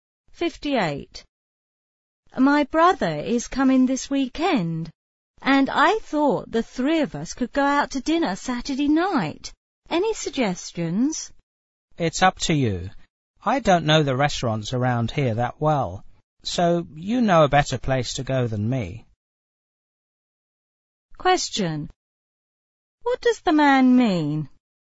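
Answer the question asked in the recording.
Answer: The woman should choose the restaurant.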